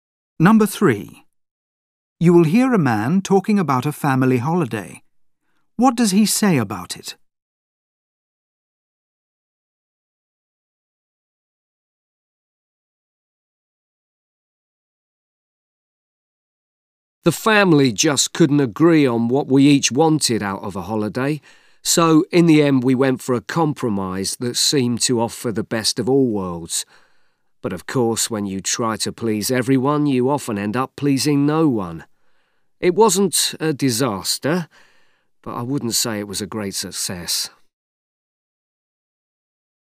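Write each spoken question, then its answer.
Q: What does he say about it?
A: It was a compromise that was only moderately successful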